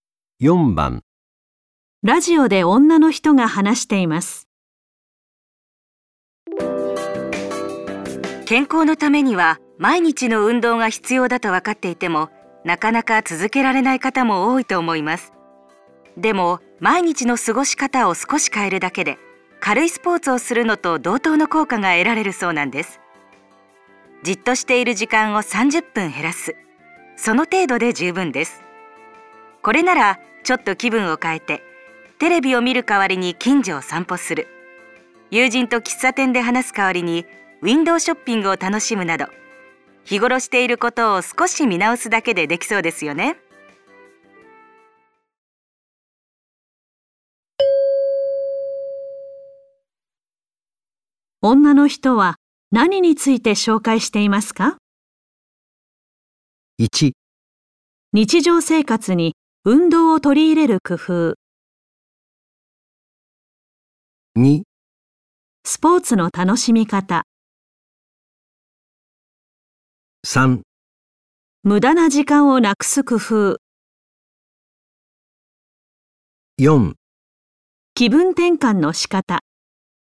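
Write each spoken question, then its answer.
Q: 女の人は何について紹介していますか?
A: 1: 日常生活に運動を取り入れる工夫。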